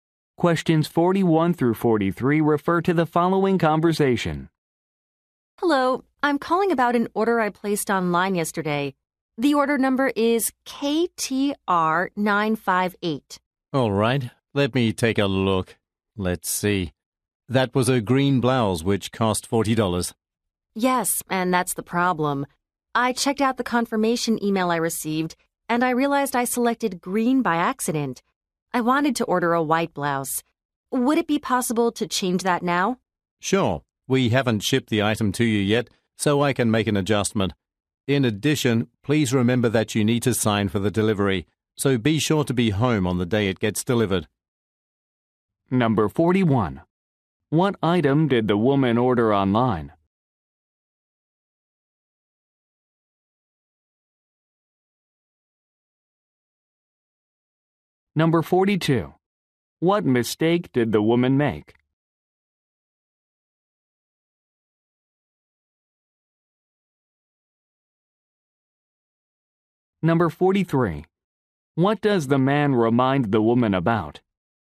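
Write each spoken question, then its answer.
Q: What item did the woman order online?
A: A blouse

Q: What mistake did the woman make?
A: She selected the wrong color

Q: What does the man remind the woman about?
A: She must sign for the delivery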